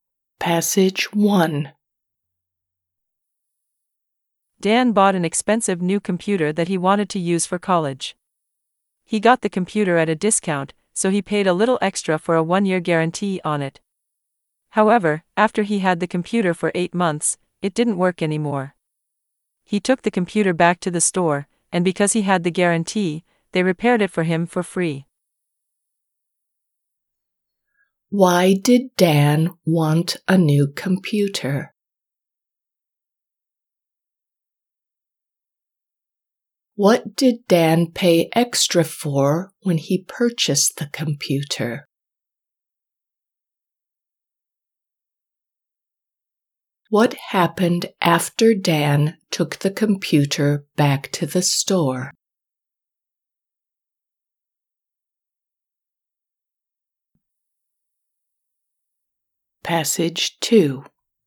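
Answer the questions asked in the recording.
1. To use for college
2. A one-year guarantee
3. They repaired it for free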